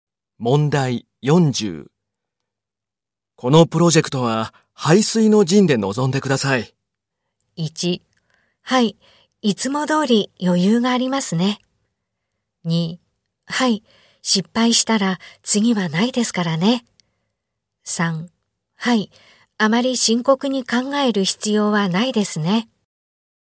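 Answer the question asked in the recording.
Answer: 2: はい、失敗したら次はないですからね。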